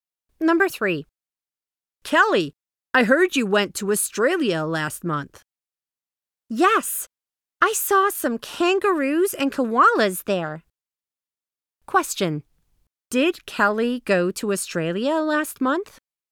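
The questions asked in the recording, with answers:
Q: Did Kelly go to Australia last month?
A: Yes, she did.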